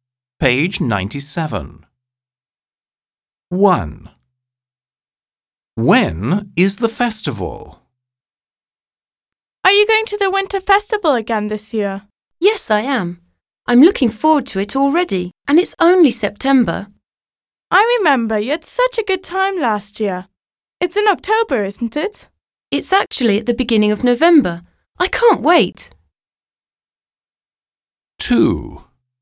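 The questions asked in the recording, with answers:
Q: When is the festival?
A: At the beginning of November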